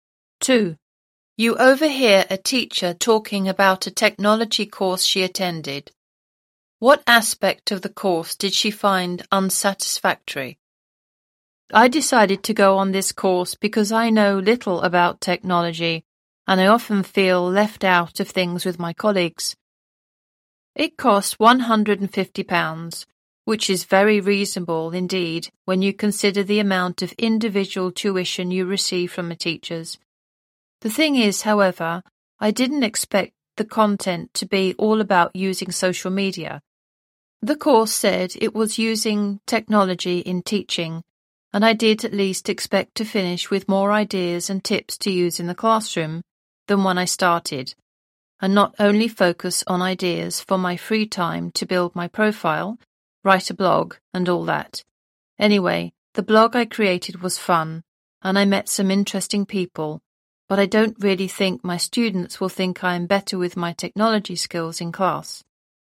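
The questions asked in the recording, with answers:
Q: What aspect of the course did she find unsatisfactory?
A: The content was about social media rather than using technology in the classroom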